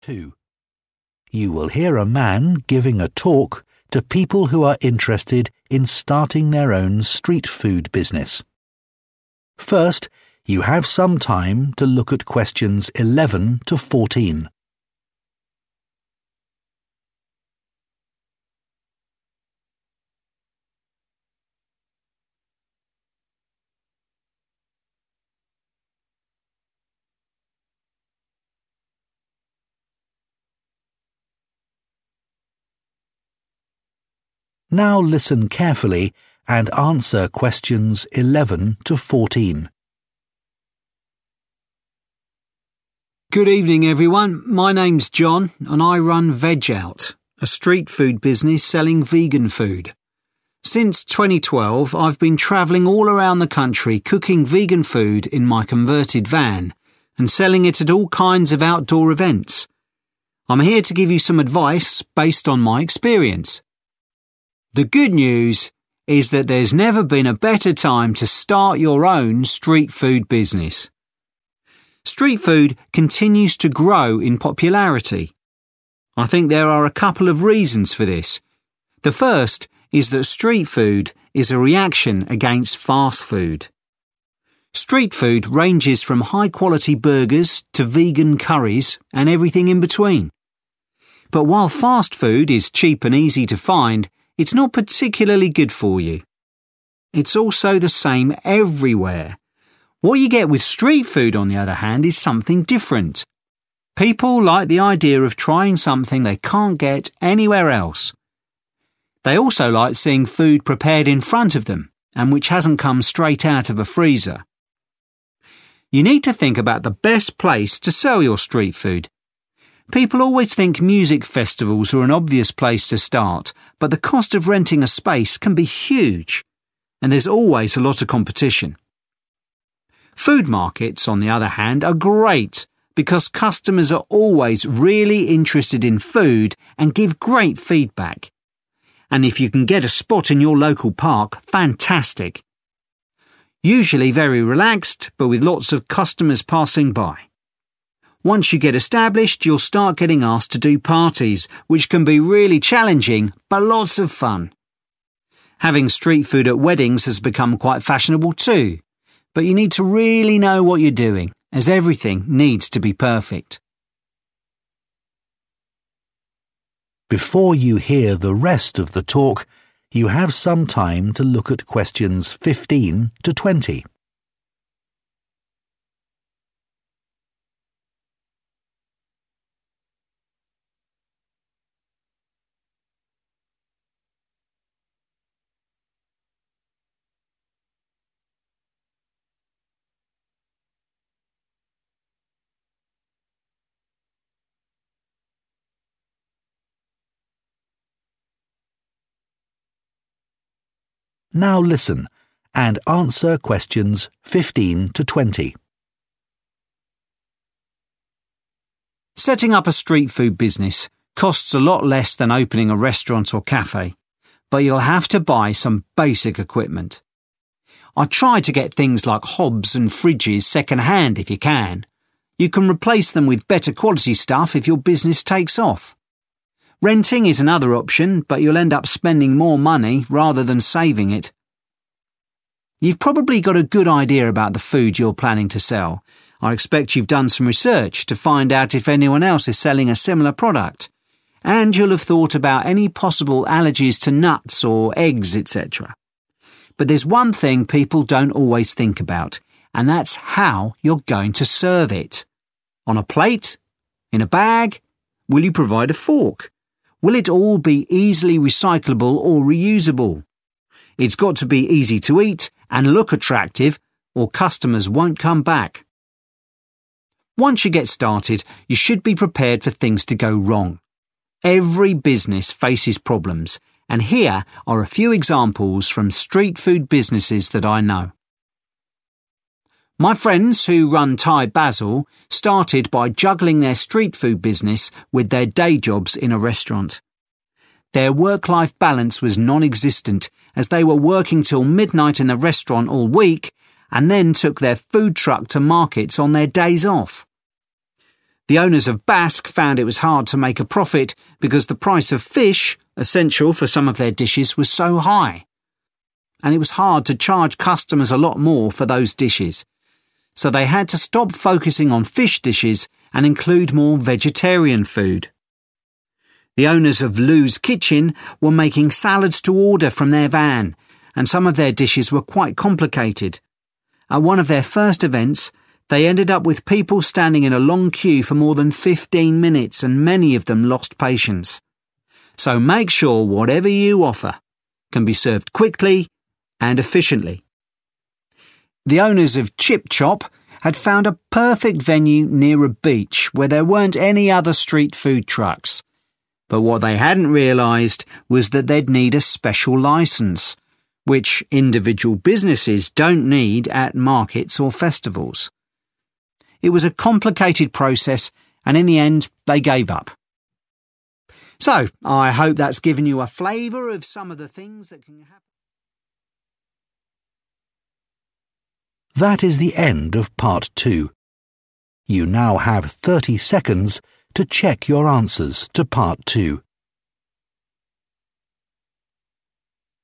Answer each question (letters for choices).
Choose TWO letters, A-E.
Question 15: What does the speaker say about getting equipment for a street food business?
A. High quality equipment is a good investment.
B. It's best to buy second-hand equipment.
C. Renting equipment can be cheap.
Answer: B

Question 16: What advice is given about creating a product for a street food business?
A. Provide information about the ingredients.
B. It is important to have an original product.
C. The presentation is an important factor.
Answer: C

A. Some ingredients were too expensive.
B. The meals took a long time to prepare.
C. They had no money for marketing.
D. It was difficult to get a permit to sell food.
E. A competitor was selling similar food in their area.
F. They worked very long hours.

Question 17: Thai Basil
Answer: F

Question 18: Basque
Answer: A

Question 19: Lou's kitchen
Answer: B

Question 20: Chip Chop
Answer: D

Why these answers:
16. It's got to be easy to eat and look attractive or customers won't come back.
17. Ở Thai Basil, mọi người không có khái niệm về cân bằng giữa công việc và cuộc sống vì họ thường làm việc đến nửa đêm tất cả các tuần.
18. Chủ nhà hàng Basque thấy rất khó để có lãi vì giá cá (nguyên liệu thiết yếu của các món ăn trong nhà hàng) rất đắt.
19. Ở bếp của Lou, các món ăn thì khá là phức tạp, và có 1 lần trong sự kiện đầu tiên, khách hàng phải chờ xếp hàng dài hơn 15 phút, nhiều trong số đó đã mất kiên nhẫn.
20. Cửa hàng Chip Chop tuy tìm được 1 địa điểm ở biển và ở đó lại không có bất kì 1 xe hàng bán đồ ăn đường phố nào, tuy nhiên họ rất khó có thể xin được giấy phép bán hàng và cuối cùng họ từ bỏ.

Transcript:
Two. You will hear a man giving a talk to people who are interested in starting their own street food business. First, you have some time to look at questions 11 to 14.
Now listen carefully and answer questions 11 to 14.
John: Good evening, everyone. My name's John, and I run Veg Out, a street food business selling vegan food. Since 2012, I've been travelling all around the country cooking vegan food in my converted van and selling it at all kinds of outdoor events. I'm here to give you some advice based on my experience.
The good news is that there's never been a better time to start your own street food business. Street food continues to grow in popularity. I think there are a couple of reasons for this. The first is that street food is a reaction against fast food. Street food ranges from high-quality burgers to vegan curries and everything in between. But while fast food is cheap and easy to find, it's not particularly good for you. It's also the same everywhere. What you get with street food, on the other hand, is something different. People like the idea of trying something they can't get anywhere else. They also like seeing food prepared in front of them, and which hasn't come straight out of a freezer.
You need to think about the best place to sell your street food. People always think music festivals are an obvious place to start, but the cost of renting a space can be huge, and there's always a lot of competition. Food markets, on the other hand, are great because customers are always really interested in food and give great feedback. And if you can get a spot in your local park, fantastic! Usually very relaxed, but with lots of customers passing by. Once you get established, you'll start getting asked to do parties, which can be really challenging but lots of fun. Having street food at weddings has become quite fashionable, too, but you need to really know what you're doing, as everything needs to be perfect.
Before you hear the rest of the talk, you have some time to look at questions 15 to 20.
Now listen and answer questions 15 to 20.
John: Setting up a street food business costs a lot less than opening a restaurant or cafe, but you'll have to buy some basic equipment. I'd try to get things like hobs and fridges second-hand if you can. You can replace them with better quality stuff if your business takes off. Renting is another option, but you'll end up spending more money rather than saving it.
You've probably got a good idea about the food you're planning to sell. I expect you've done some research to find out if anyone else is selling a similar product, and you'll have thought about any possible allergies to nuts or eggs, etcetera. But there's one thing people don't always think about, and that's how you're going to serve it. On a plate? In a bag? Will you provide a fork? Will it all be easily recyclable or reusable? It's got to be easy to eat and look attractive, or customers won't come back.
Once you get started, you should be prepared for things to go wrong. Every business faces problems, and here are a few examples from street food businesses that I know.
My friends who run Thai Basil started by juggling their street food business with their day jobs in a restaurant. Their work-life balance was non-existent, as they were working till midnight in the restaurant all week, and then took their food truck to markets on their days off.
The owners of Bask found it was hard to make a profit because the price of fish—essential for some of their dishes—was so high. And it was hard to charge customers a lot more for those dishes. So they had to stop focusing on fish dishes and include more vegetarian food.
The owners of Lou's Kitchen were making salads to order from their van, and some of their dishes were quite complicated. At one of their first events, they ended up with people standing in a long queue for more than 15 minutes, and many of them lost patience. So make sure whatever you offer can be served quickly and efficiently.
The owners of Chip Chop had found a perfect venue near a beach where there weren't any other street food trucks. But what they hadn't realized was that they'd need a special license, which individual businesses don't need at markets or festivals. It was a complicated process, and in the end, they gave up.
So, I hope that's given you a flavor of some of the things that can happen...
Câu 11: Which TWO explanations for the popularity of street food are given?